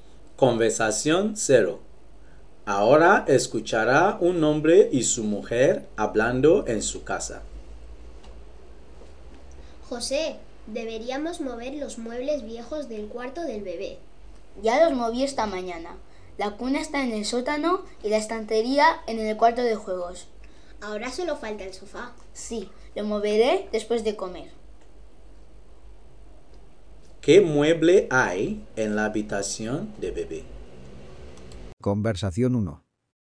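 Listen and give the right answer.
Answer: El sofá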